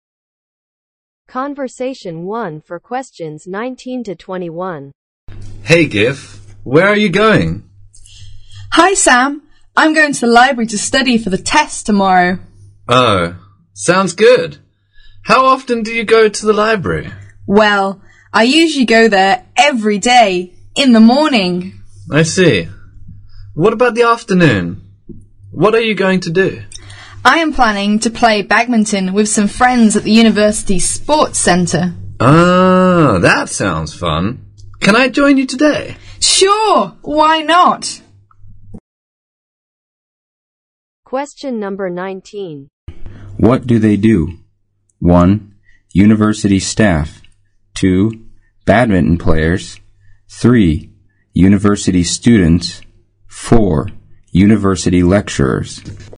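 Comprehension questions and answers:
Conversation 1 for questions 19 to 21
What do they do?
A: University students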